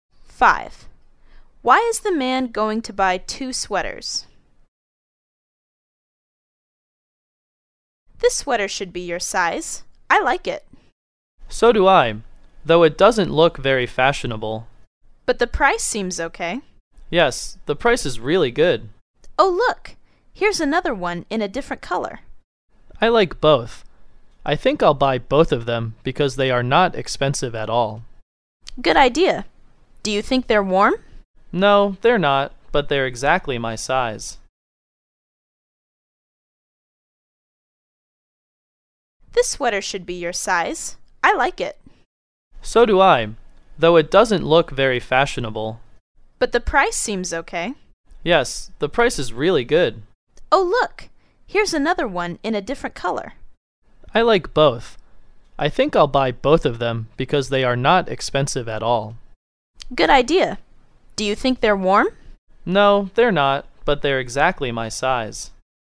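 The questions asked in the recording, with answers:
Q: Why is the man going to buy 2 sweaters?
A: Because they are not expensive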